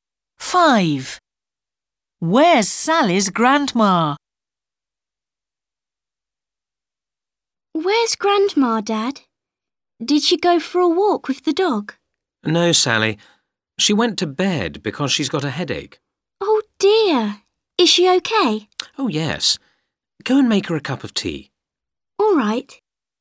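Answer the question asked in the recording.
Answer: In bed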